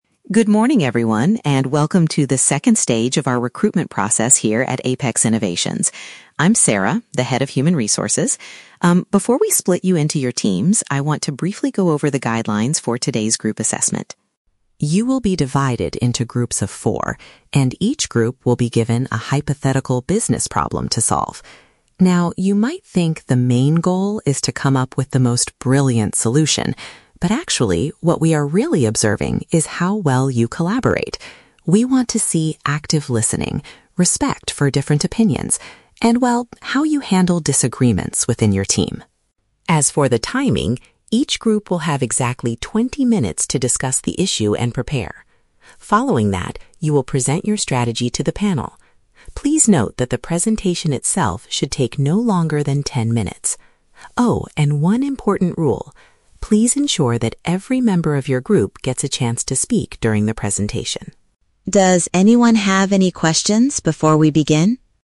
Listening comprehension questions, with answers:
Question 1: What is the recruitment committee mainly evaluating today?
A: The candidates' teamwork and communication skills.

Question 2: How much time is allowed for the presentation?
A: 10 minutes

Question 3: What is a strict requirement for the presentation round?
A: Every candidate in the group must speak.

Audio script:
Speaker: Good morning, everyone, and welcome to the second stage of our recruitment process here at Apex Innovations. I'm Sarah, the Head of Human Resources. Um, before we split you into your teams, I want to briefly go over the guidelines for today's group assessment.
You will be divided into groups of four, and each group will be given a hypothetical business problem to solve. Now, you might think the main goal is to come up with the most brilliant solution, but actually, what we are really observing is how well you collaborate. We want to see active listening, respect for different opinions, and, well, how you handle disagreements within your team.
As for the timing, each group will have exactly twenty minutes to discuss the issue and prepare. Following that, you will present your strategy to the panel. Please note that the presentation itself should take no longer than ten minutes. Oh, and one important rule... please ensure that every member of your group gets a chance to speak during the presentation.